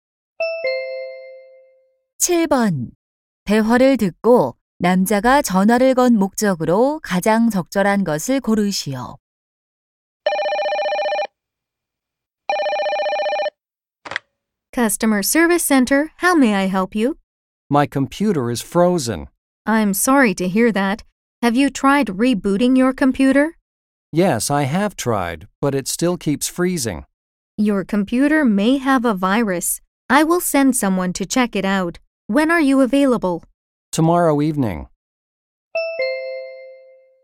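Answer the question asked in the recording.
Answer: 컴퓨터 수리 요청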